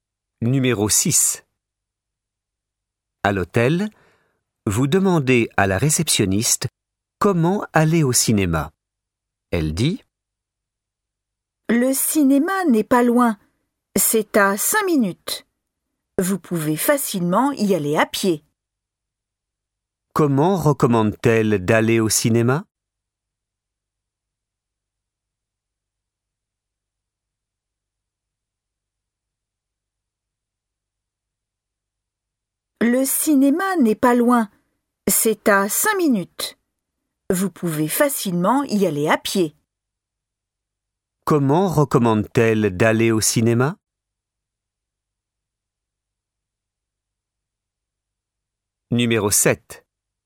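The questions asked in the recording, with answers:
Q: Comment recommande-t-elle d'aller au cinéma?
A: À pied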